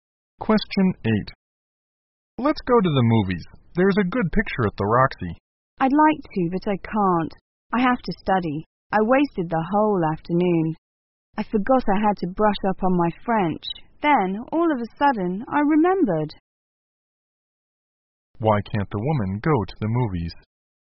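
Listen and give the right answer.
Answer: She has to study French.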